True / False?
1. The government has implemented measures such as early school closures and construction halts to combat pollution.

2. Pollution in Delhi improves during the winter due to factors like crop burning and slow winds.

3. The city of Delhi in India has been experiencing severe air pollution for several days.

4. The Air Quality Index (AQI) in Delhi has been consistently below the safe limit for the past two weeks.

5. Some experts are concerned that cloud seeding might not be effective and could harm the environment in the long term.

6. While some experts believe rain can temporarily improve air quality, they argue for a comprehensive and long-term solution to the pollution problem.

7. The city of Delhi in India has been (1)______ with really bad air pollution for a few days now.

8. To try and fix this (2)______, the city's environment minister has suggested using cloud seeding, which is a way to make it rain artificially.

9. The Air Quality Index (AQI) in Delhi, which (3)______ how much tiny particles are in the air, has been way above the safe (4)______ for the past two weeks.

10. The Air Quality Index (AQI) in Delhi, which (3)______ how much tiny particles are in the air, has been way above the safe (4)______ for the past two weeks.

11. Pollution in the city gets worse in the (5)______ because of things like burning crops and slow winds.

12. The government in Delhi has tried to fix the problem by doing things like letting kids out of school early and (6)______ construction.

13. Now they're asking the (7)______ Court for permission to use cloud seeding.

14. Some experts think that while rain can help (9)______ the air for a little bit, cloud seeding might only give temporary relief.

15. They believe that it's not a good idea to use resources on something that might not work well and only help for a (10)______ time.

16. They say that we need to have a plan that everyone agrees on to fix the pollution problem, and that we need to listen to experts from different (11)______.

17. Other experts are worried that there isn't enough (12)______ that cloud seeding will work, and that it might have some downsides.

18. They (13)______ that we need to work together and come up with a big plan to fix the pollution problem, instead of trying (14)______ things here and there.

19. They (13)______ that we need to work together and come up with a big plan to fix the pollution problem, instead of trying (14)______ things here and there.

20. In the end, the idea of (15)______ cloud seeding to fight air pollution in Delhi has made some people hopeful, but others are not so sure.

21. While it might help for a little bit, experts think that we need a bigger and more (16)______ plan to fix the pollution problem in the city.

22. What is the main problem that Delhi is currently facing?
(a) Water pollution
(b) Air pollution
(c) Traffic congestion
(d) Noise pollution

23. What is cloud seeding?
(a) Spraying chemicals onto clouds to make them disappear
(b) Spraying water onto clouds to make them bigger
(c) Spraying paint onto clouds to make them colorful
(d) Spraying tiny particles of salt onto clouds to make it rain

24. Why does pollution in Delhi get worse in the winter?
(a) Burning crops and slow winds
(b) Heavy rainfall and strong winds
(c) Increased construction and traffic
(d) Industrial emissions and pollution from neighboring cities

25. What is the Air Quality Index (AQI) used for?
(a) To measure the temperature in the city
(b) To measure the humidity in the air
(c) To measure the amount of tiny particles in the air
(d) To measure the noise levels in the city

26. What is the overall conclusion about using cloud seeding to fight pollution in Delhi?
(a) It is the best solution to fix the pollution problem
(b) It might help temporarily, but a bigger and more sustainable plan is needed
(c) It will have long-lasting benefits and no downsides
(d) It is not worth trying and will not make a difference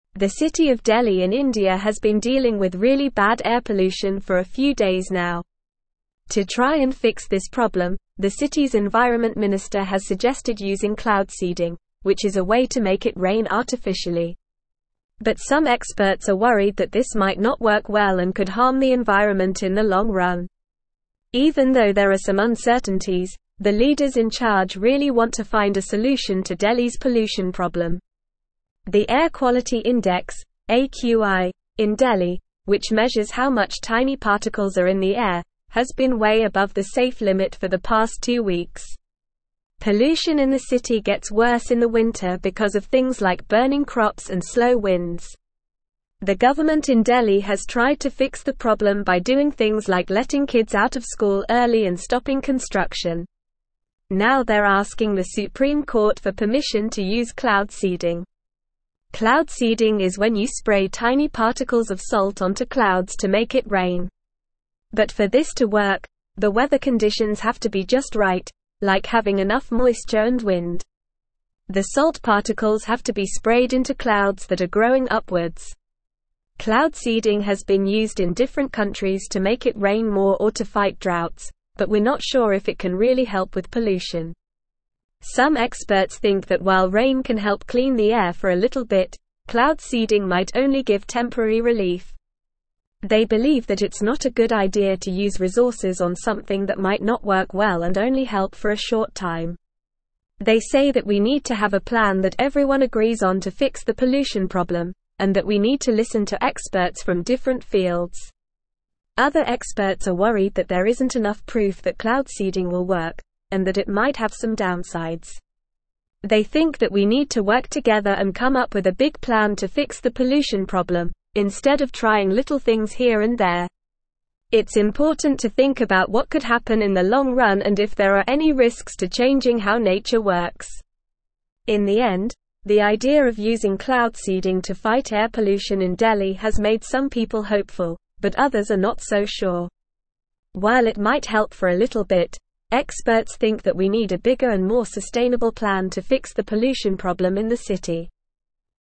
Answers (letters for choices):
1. True
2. False
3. True
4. False
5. True
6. True
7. dealing
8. problem
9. measures
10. limit
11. winter
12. stopping
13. Supreme
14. clean
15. short
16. fields
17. proof
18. think
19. little
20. using
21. sustainable
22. b
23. d
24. a
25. c
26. b

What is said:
The city of Delhi in India has been dealing with really bad air pollution for a few days now. To try and fix this problem, the city's environment minister has suggested using cloud seeding, which is a way to make it rain artificially. But some experts are worried that this might not work well and could harm the environment in the long run. Even though there are some uncertainties, the leaders in charge really want to find a solution to Delhi's pollution problem.
The Air Quality Index (AQI) in Delhi, which measures how much tiny particles are in the air, has been way above the safe limit for the past two weeks. Pollution in the city gets worse in the winter because of things like burning crops and slow winds. The government in Delhi has tried to fix the problem by doing things like letting kids out of school early and stopping construction. Now they're asking the Supreme Court for permission to use cloud seeding.
Cloud seeding is when you spray tiny particles of salt onto clouds to make it rain. But for this to work, the weather conditions have to be just right, like having enough moisture and wind. The salt particles have to be sprayed into clouds that are growing upwards. Cloud seeding has been used in different countries to make it rain more or to fight droughts, but we're not sure if it can really help with pollution.
Some experts think that while rain can help clean the air for a little bit, cloud seeding might only give temporary relief. They believe that it's not a good idea to use resources on something that might not work well and only help for a short time. They say that we need to have a plan that everyone agrees on to fix the pollution problem, and that we need to listen to experts from different fields.
Other experts are worried that there isn't enough proof that cloud seeding will work, and that it might have some downsides. They think that we need to work together and come up with a big plan to fix the pollution problem, instead of trying little things here and there. It's important to think about what could happen in the long run and if there are any risks to changing how nature works.
In the end, the idea of using cloud seeding to fight air pollution in Delhi has made some people hopeful, but others are not so sure. While it might help for a little bit, experts think that we need a bigger and more sustainable plan to fix the pollution problem in the city.

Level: Level 3